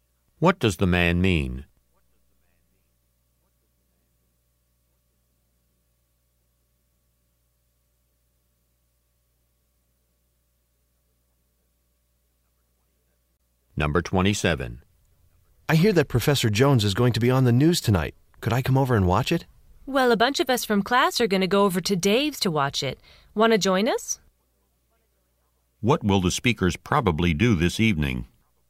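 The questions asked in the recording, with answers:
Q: What will the speakers probably do this evening?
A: Watch Professor Jones on the news at Dave's.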